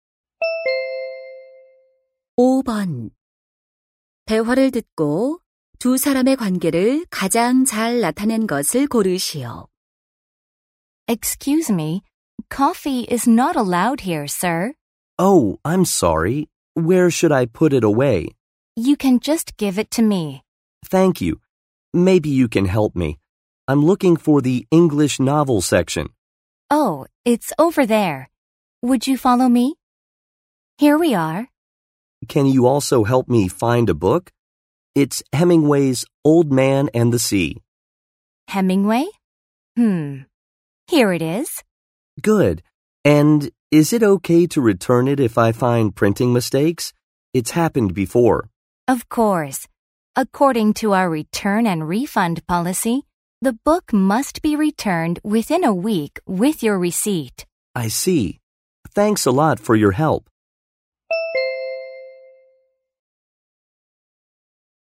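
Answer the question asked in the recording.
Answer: 서점 직원 - 손님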